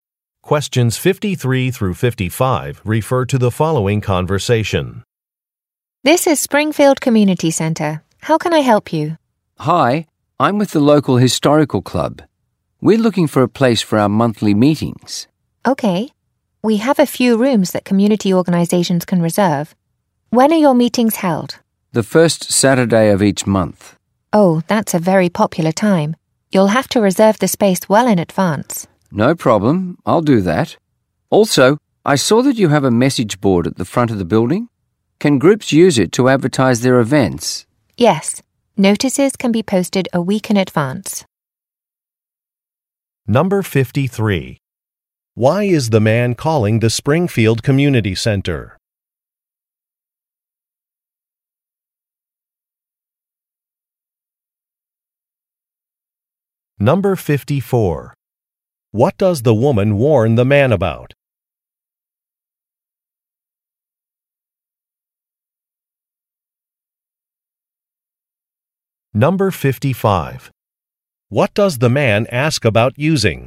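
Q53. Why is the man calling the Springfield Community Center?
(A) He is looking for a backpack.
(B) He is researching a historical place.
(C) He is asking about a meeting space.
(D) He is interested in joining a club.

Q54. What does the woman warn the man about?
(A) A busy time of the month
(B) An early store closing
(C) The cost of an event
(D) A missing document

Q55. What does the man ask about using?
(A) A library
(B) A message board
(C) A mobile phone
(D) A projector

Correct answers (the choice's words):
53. He is asking about a meeting space.
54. A busy time of the month
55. A message board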